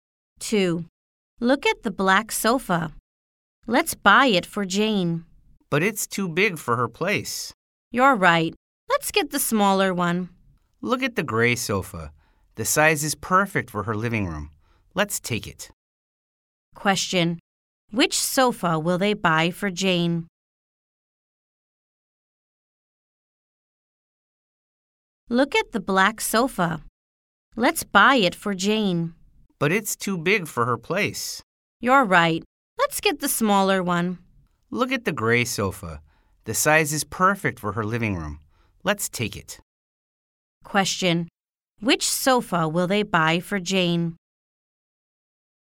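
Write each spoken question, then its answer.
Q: Which sofa will they buy for Jane?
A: The gray sofa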